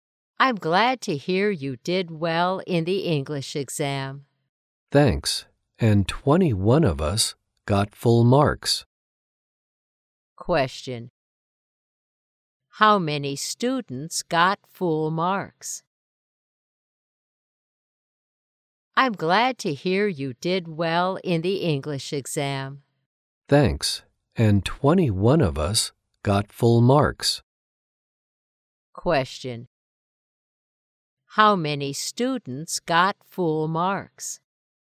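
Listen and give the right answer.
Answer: 21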